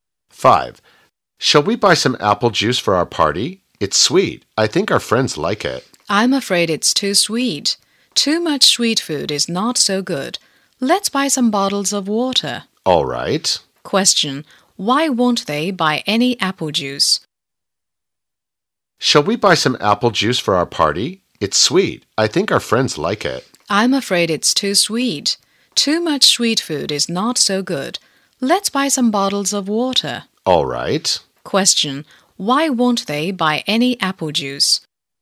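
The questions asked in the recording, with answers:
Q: Why won't they buy any apple juice?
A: It's too sweet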